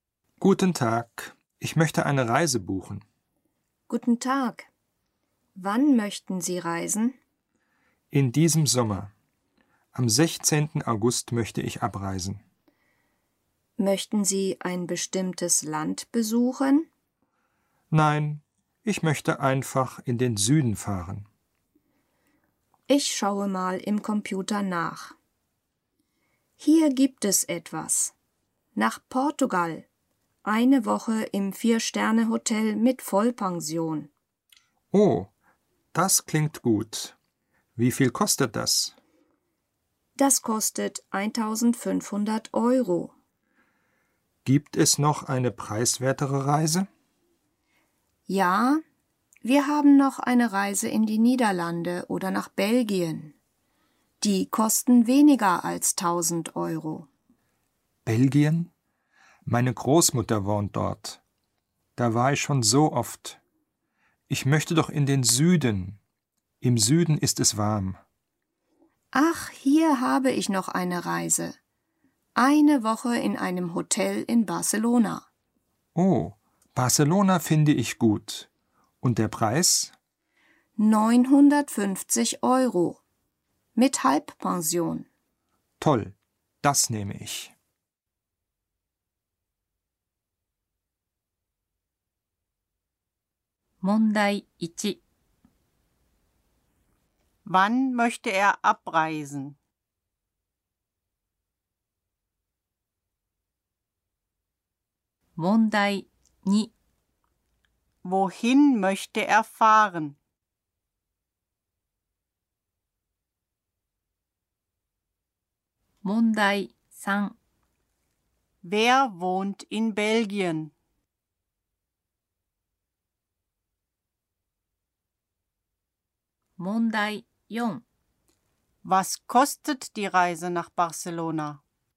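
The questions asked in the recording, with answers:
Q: Wann möchte er abreisen?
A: Am 16. August

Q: Wohin möchte er fahren?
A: In den Süden (nach Barcelona)

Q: Wer wohnt in Belgien?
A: Seine Großmutter

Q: Was kostet die Reise nach Barcelona?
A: 950 Euro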